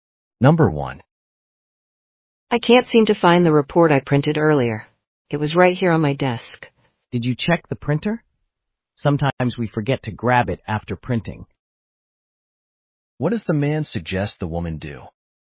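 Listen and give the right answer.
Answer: Check the printer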